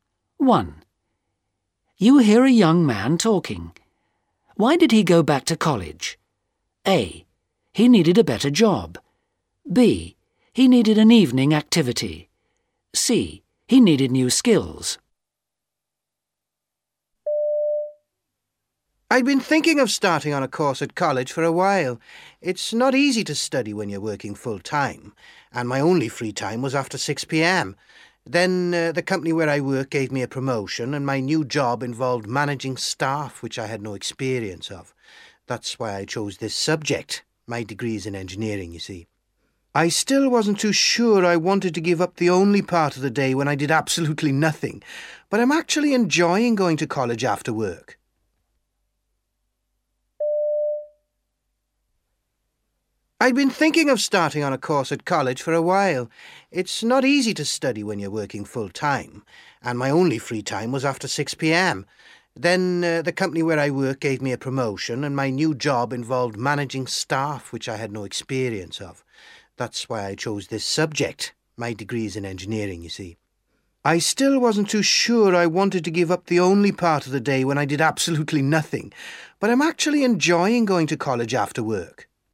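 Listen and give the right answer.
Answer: C: He needed new skills.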